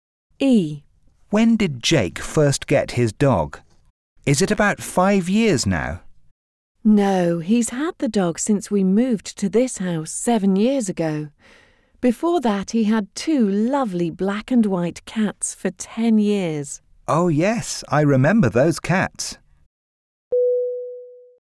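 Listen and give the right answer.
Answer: 7 years ago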